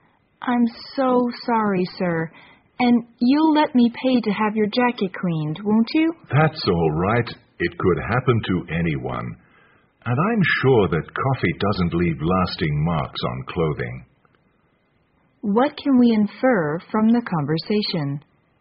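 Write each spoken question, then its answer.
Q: What can we infer from the conversation?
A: The woman spilled coffee on the man's jacket.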